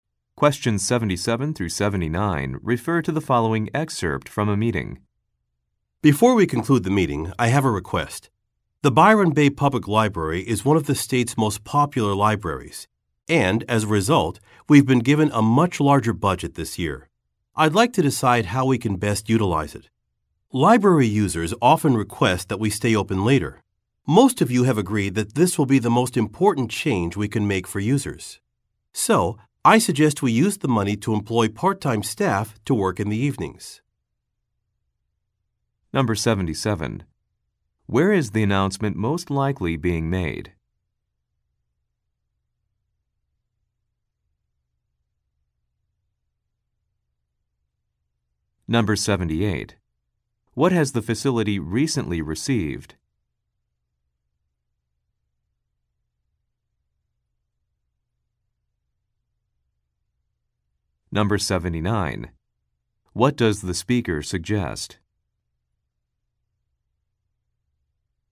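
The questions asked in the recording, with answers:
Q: Where is the announcement most likely being made?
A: At a public library

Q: What has the facility recently received?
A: A much larger budget

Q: What does the speaker suggest?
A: Hiring part-time staff to work evenings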